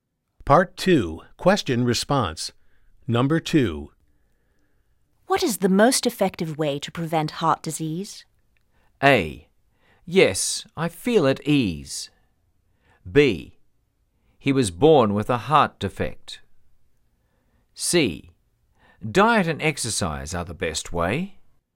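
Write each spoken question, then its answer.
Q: What is the most effective way to prevent heart disease?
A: C: Diet and exercise are the best way.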